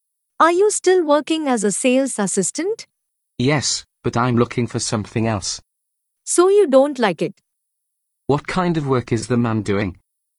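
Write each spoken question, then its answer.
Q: What kind of work is the man doing?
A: He's a sales assistant.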